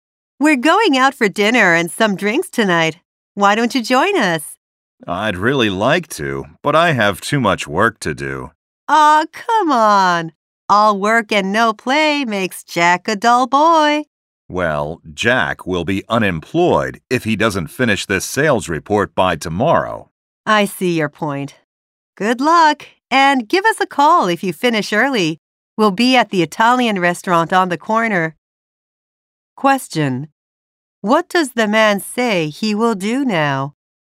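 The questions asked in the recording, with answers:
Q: What does the man say he will do now?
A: Work on (finish) his sales report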